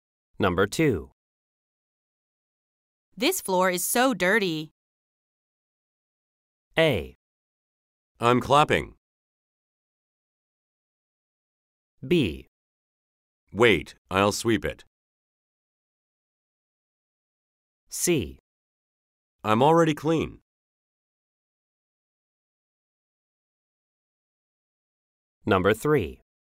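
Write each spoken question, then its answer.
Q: This floor is so dirty.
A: B: Wait, I'll sweep it.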